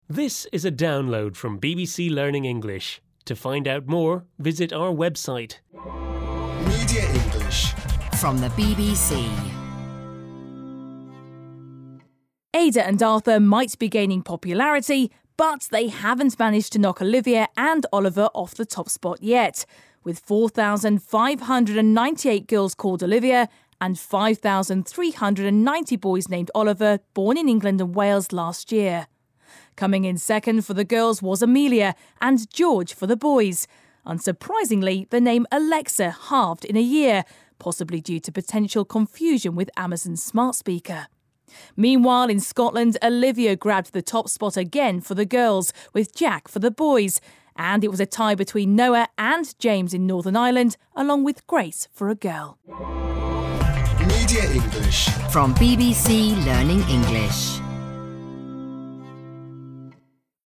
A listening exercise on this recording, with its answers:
阅读理解:请在读完上文后,回答下列问题 。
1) What was the most popular name for a boy last year in Scotland?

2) Why has the name Alexa become less popular?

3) True or false? Arthur has become the most popular boy's name in England and Wales.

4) Is this the first time Olivia has been the most popular name for girls in Scotland?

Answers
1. Jack
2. possibly due to potential confusion with Amazon's smart speaker
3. False
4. No

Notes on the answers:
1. Jack 'grabbed the top spot for boys' names in Scotland (ie: It was the most popular.)
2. The name Alexa halved in a year, possibly due to potential confusion with Amazon's smart speaker.
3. The name Arthur has gained in popularity but Oliver is still the most popular boys name in England and Wales.
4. Olivia grabbed the top spot again for the girls' names in Scotland.

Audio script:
Aida and Arthur might be gaining popularity, but they haven't managed to knock Olivia and Oliver off the top spot yet - with 4,598 girls called Olivia and 5,390 boys named Oliver born in England and Wales last year.
Coming in second for the girls was Amelia, and George for the boys. Unsurprisingly, the name Alexa halved in a year, possibly due to potential confusion with Amazon's smart speaker.